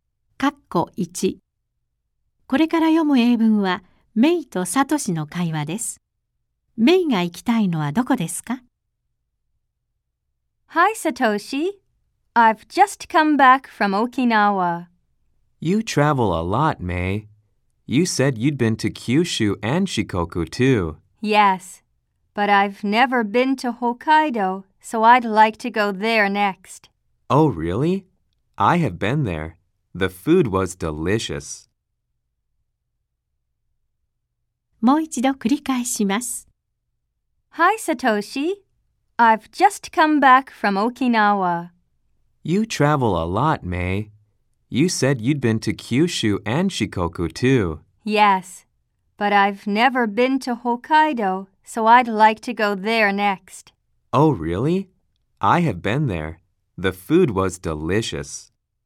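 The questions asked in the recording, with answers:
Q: メイが行きたいのはどこですか?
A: 北海道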